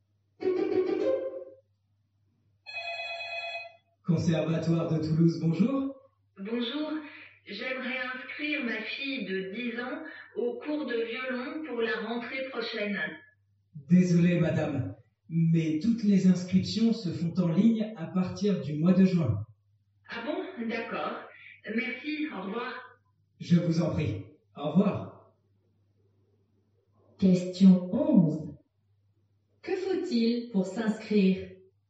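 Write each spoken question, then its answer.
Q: Que faut-il pour s'inscrire?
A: S'inscrire en ligne à partir du mois de juin.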